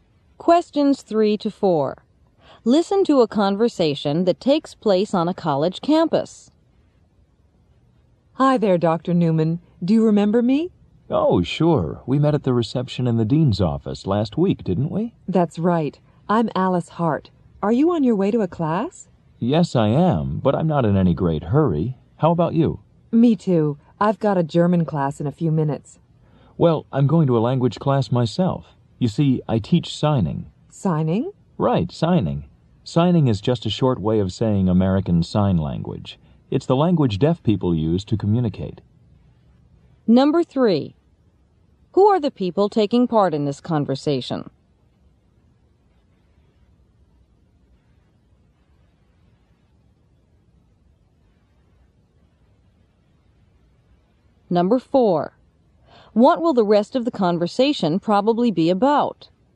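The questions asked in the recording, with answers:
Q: What will the rest of the conversation probably be about?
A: American Sign Language (signing)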